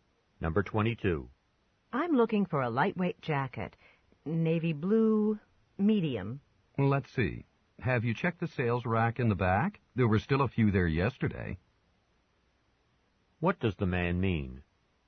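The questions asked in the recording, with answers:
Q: What does the man mean?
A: There may be such a jacket on the sales rack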